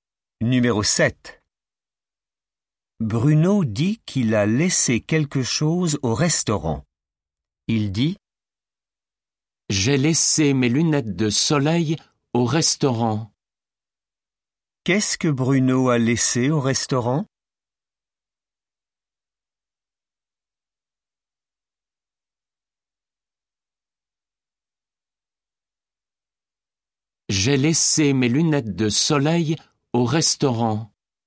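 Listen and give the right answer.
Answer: ses lunettes de soleil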